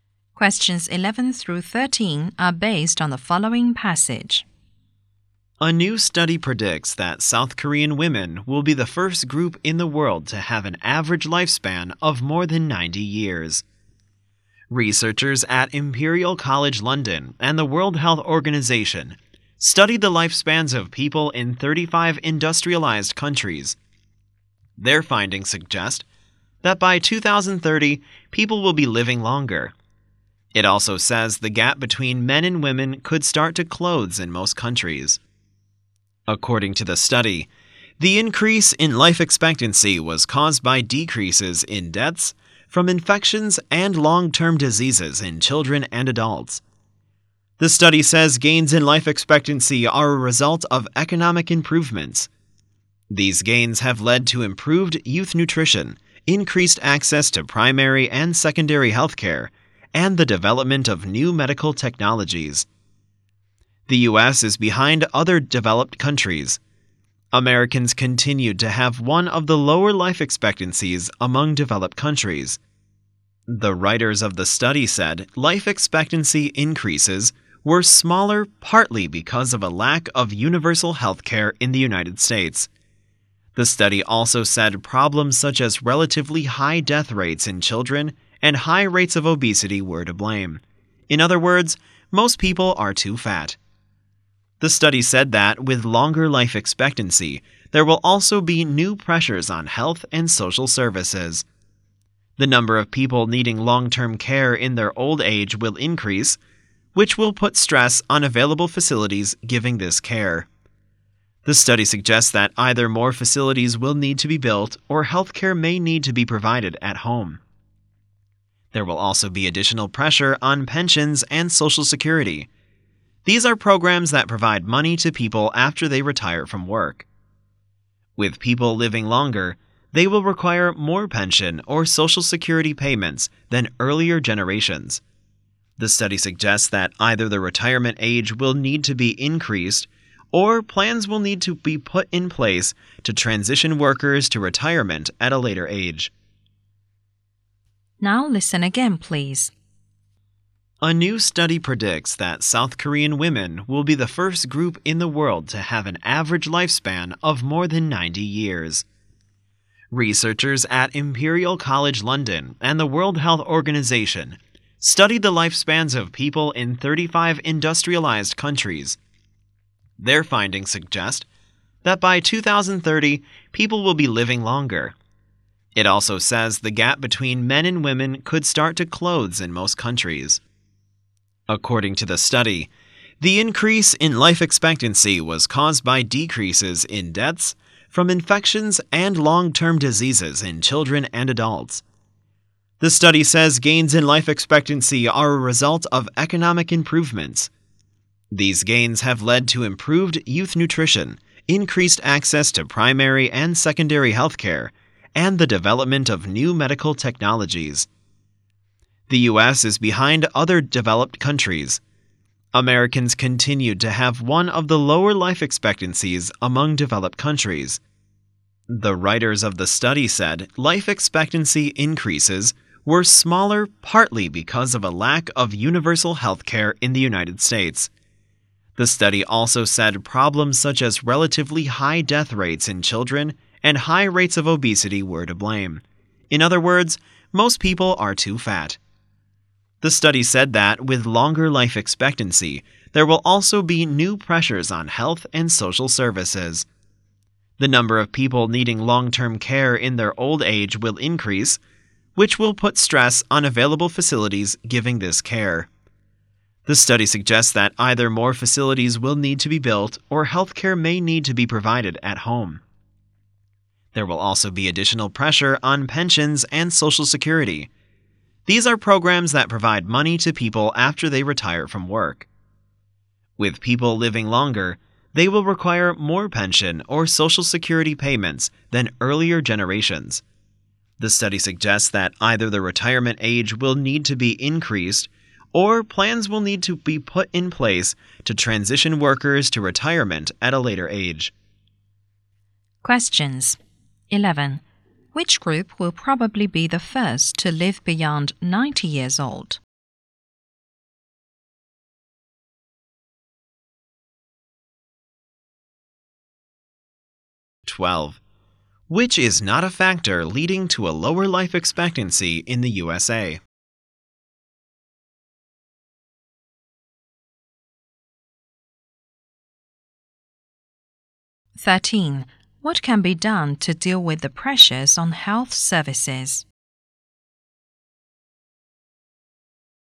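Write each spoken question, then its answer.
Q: Which group will probably be the first to live beyond 90 years old?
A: South Korean women

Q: What can be done to deal with the pressures on health services?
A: Build more facilities or provide healthcare at home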